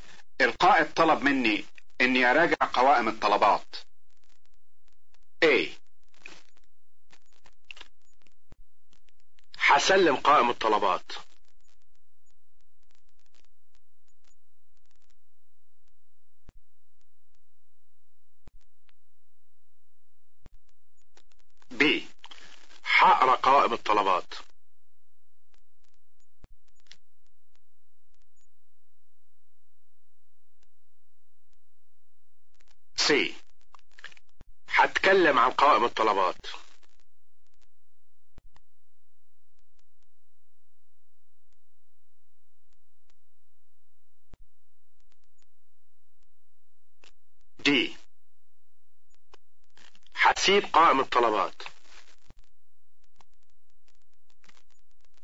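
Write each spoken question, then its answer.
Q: القائد طلب مني اني اراجع قوائم الطلبات.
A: B: هقرا قوائم الطلبات.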